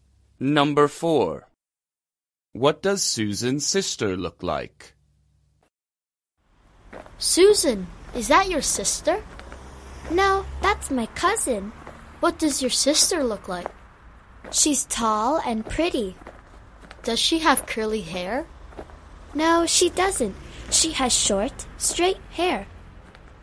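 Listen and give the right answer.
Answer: Tall and pretty with short, straight hair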